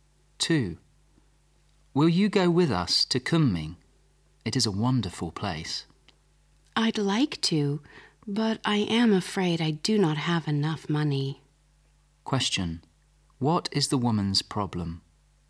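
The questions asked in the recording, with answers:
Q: What is the woman's problem?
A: She doesn't have enough money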